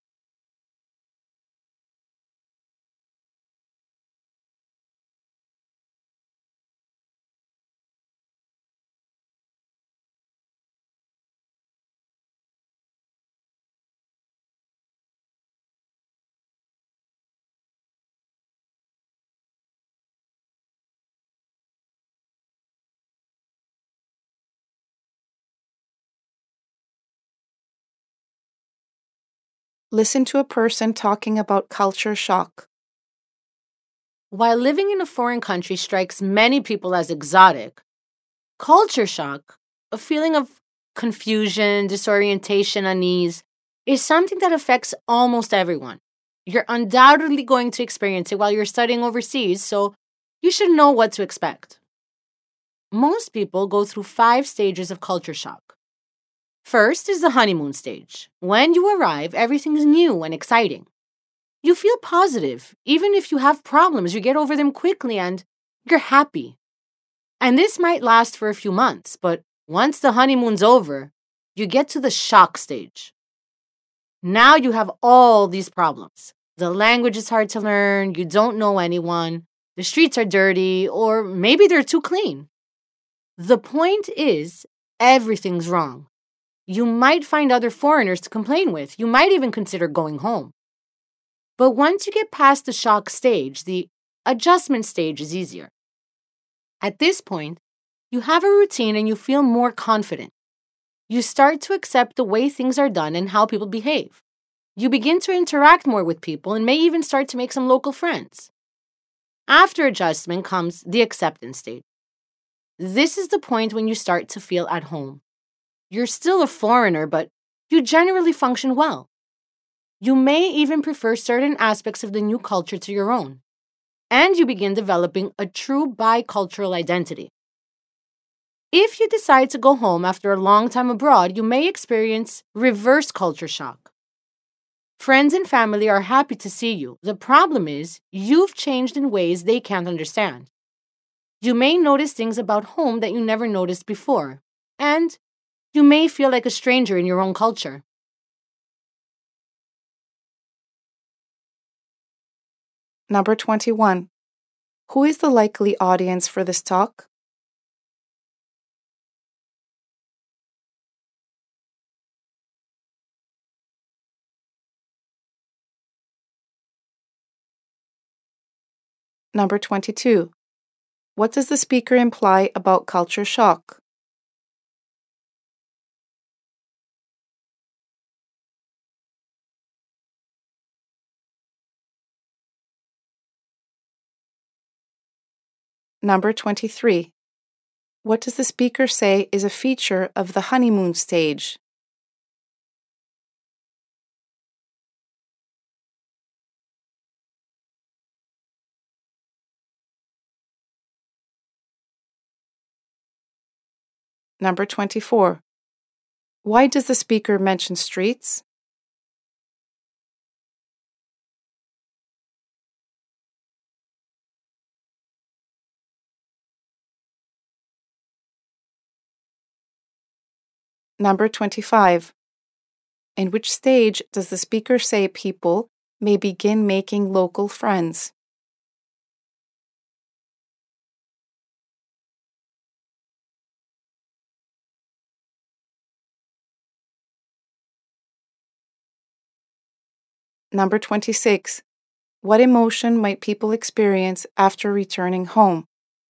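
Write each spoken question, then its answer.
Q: Who is the likely audience for this talk?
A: Students going to study overseas

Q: What does the speaker say is a feature of the honeymoon stage?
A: Everything feels new and exciting; problems are overcome quickly

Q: Why does the speaker mention streets?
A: To show that everything seems wrong in the shock stage

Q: In which stage does the speaker say people may begin making local friends?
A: The adjustment stage

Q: What emotion might people experience after returning home?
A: Feeling like a stranger in their own culture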